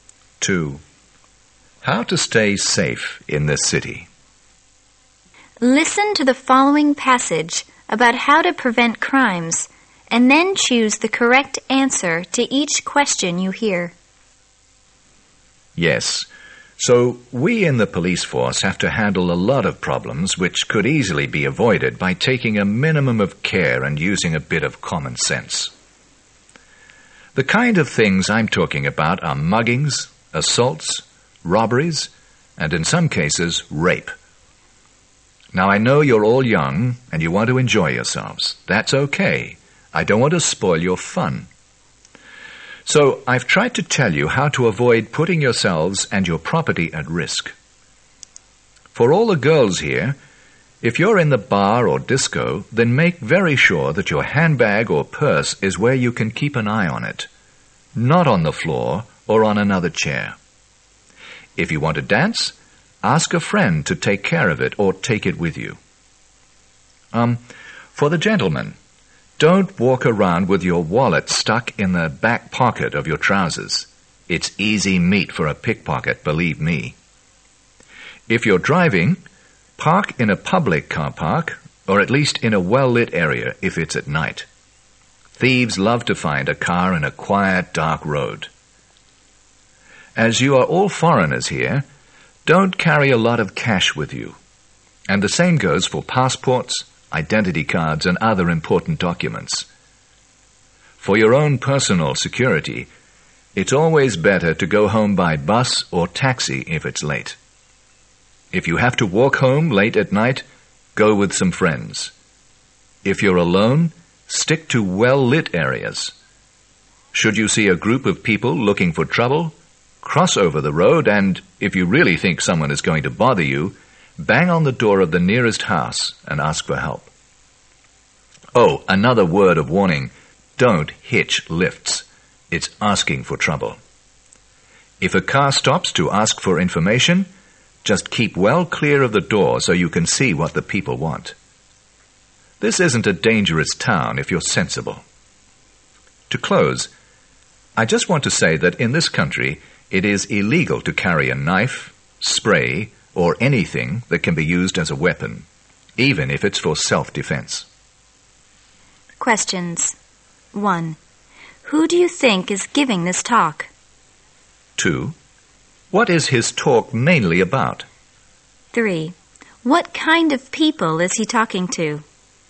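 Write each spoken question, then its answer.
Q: Who do you think is giving this talk?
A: A police officer

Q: What is his talk mainly about?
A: How to stay safe and avoid crime in the city

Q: What kind of people is he talking to?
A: Young foreigners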